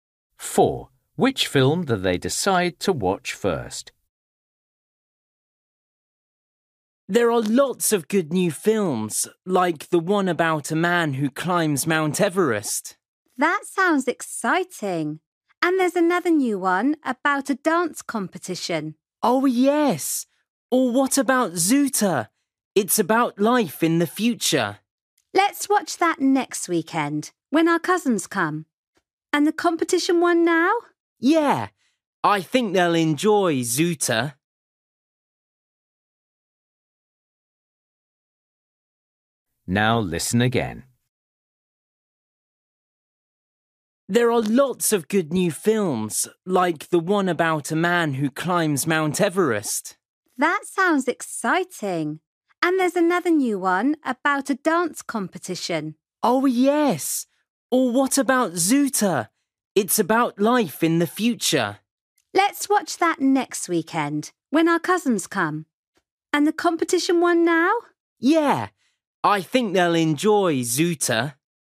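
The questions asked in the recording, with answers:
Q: Which film do they decide to watch first?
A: The film about a dance competition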